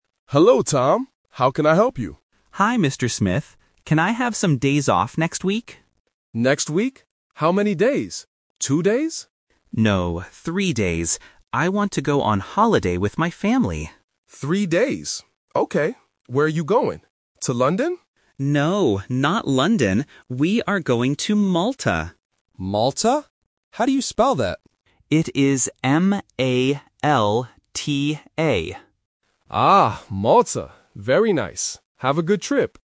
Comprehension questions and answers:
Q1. How many days off does Tom want?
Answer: Three days

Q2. Who is Tom going on holiday with?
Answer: His family

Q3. How does Tom spell the name of the place?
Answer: M-A-L-T-A

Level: A1